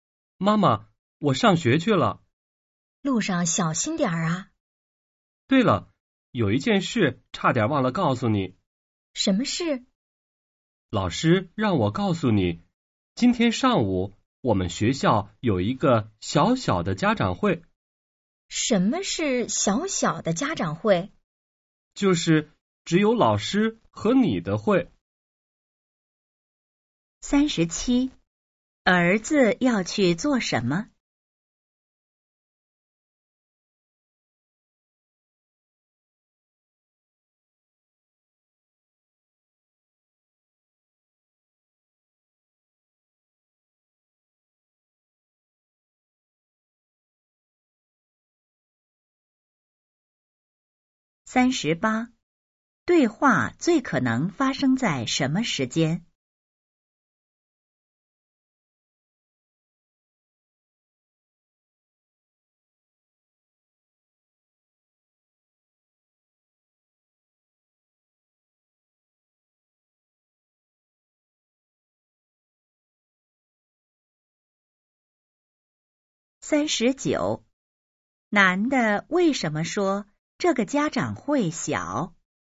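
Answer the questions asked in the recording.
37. 上学
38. 早上
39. 只有老师和妈妈参加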